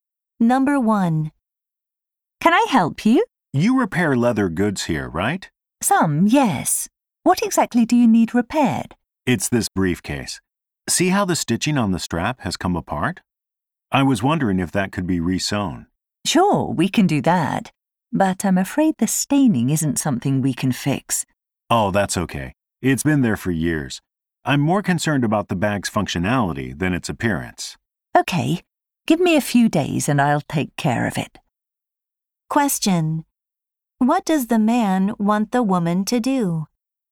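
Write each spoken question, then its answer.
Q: What does the man want the woman to do?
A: Re-sew the stitching on his briefcase strap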